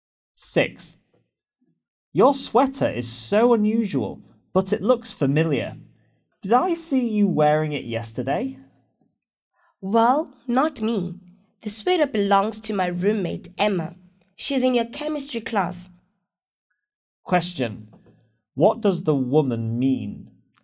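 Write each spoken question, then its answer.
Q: What does the woman mean?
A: It was her roommate Emma, not her, who wore the sweater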